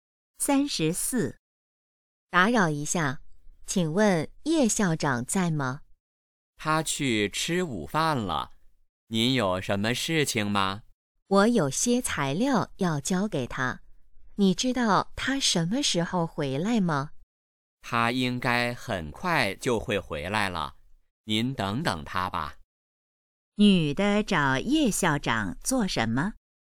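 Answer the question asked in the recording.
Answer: 交材料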